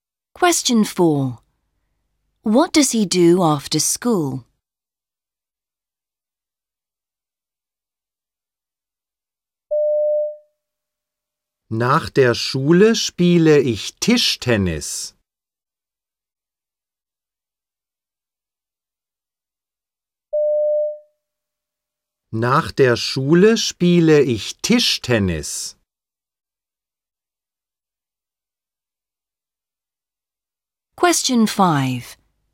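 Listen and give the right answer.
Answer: He plays table tennis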